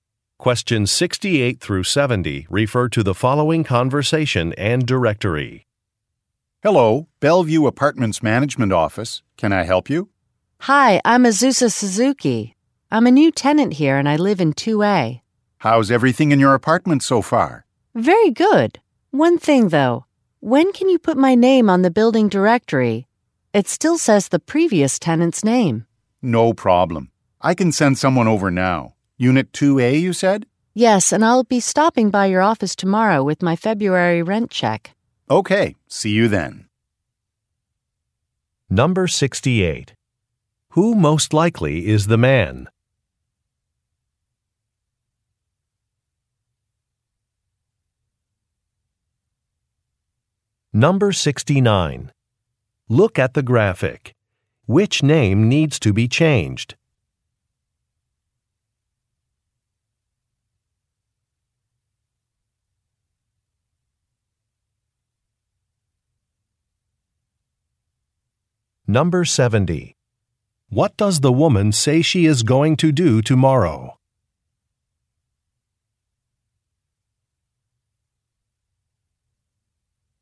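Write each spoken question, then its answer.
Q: Who most likely is the man?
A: A worker at the apartment management office

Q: What does the woman say she is going to do tomorrow?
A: Stop by the office with her February rent check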